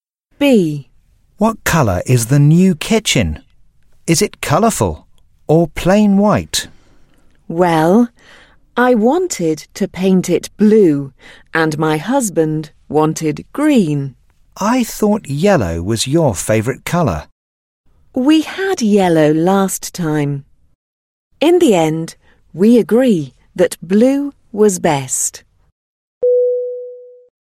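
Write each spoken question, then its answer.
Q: What colour is the new kitchen?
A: Blue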